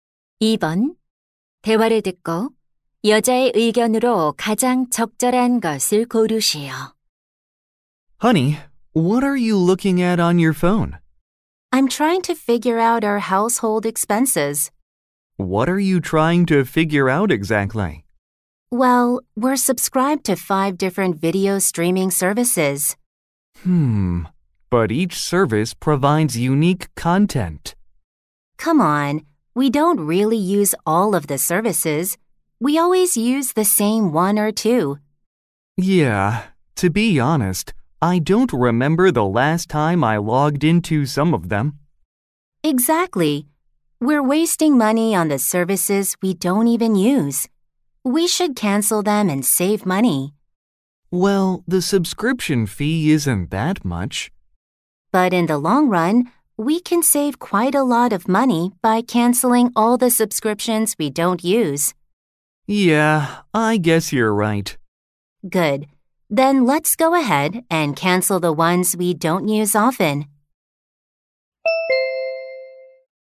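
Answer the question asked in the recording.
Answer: 사용하지 않는 구독 서비스는 해지해야 한다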